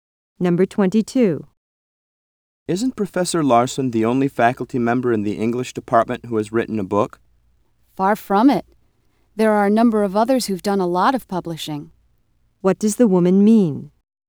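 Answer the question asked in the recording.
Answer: Many other English faculty members have published books.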